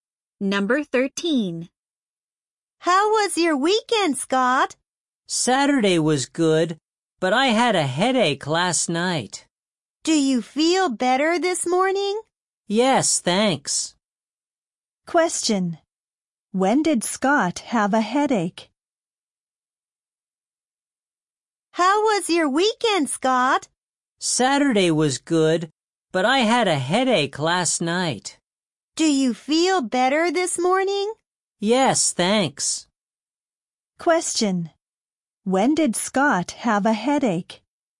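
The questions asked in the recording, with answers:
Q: When did Scott have a headache?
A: Last night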